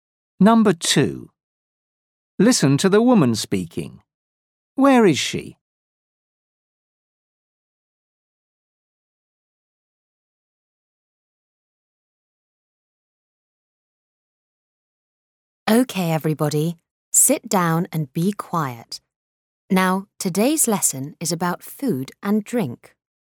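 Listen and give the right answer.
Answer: in a classroom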